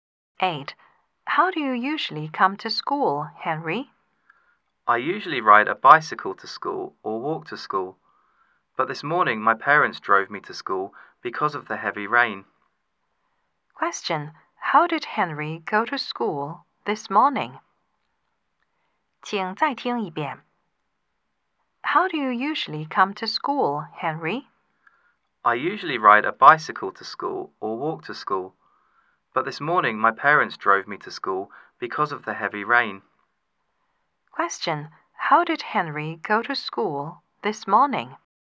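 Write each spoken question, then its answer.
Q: How did Henry go to school this morning?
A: By car (his parents drove him)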